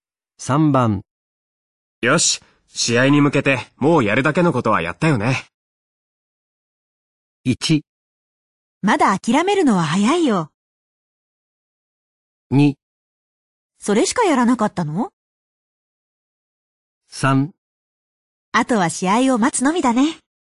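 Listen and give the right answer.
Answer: 3: あとは試合を待つのみだね。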